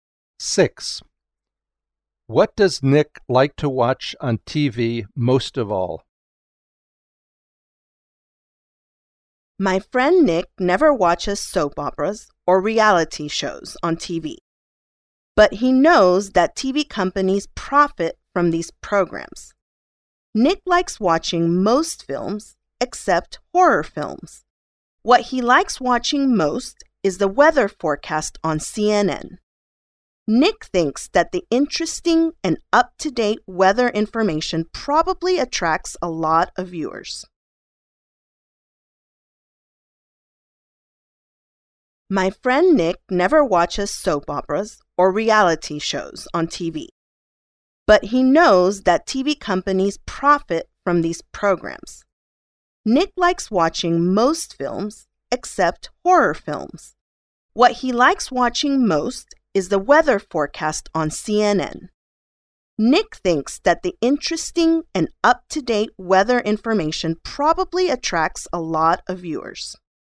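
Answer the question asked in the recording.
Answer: The weather forecast on CNN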